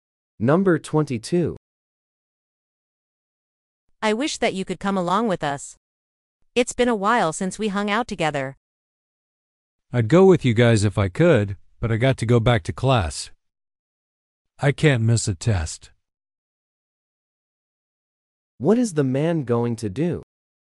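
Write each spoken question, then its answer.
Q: What is the man going to do?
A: Go back to class to take a test.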